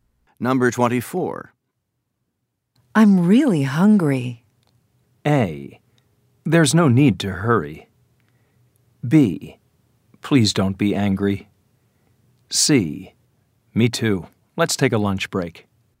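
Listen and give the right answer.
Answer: C: Me too. Let's take a lunch break.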